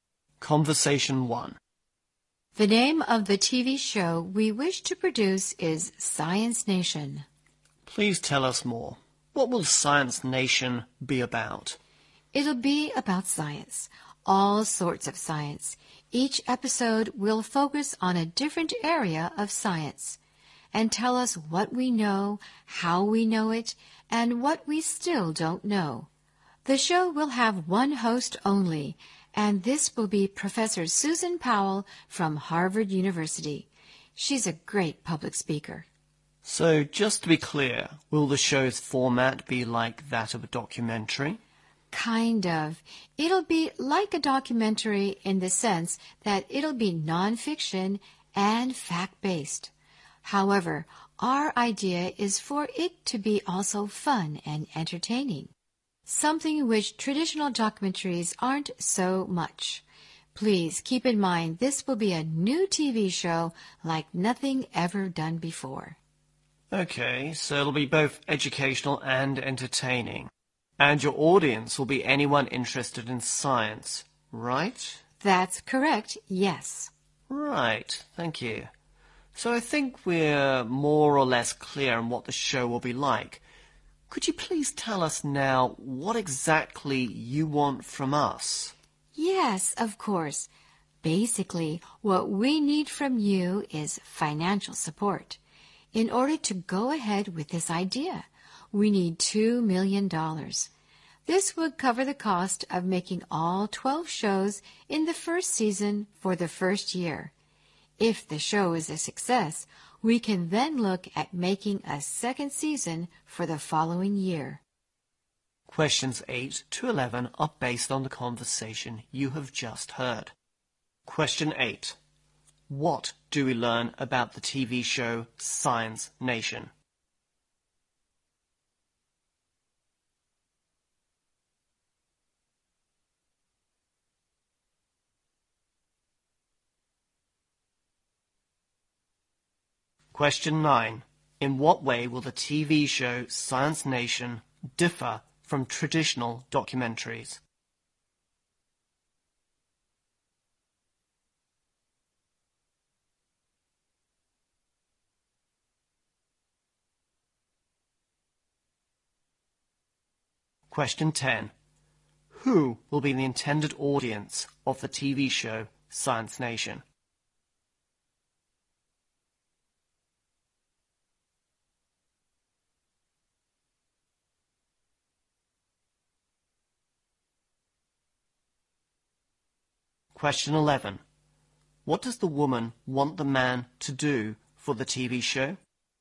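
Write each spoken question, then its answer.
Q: In what way will the TV show Science Nation differ from traditional documentaries?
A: It will be fun and entertaining

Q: Who will be the intended audience of the TV show Science Nation?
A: Anyone interested in science

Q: What does the woman want the man to do for the TV show?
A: Provide financial support ($2 million)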